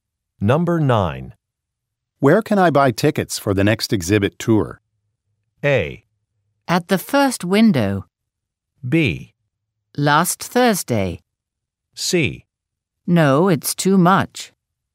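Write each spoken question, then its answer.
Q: Where can I buy tickets for the next exhibit tour?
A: A: At the first window.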